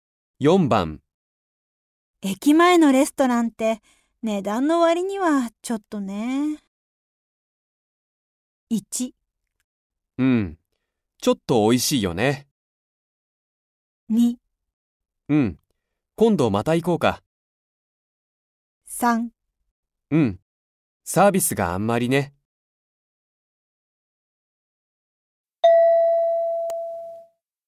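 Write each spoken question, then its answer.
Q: 駅前のレストランって値段の割にはちょっとね。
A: 3: うん、サービスがあんまりね。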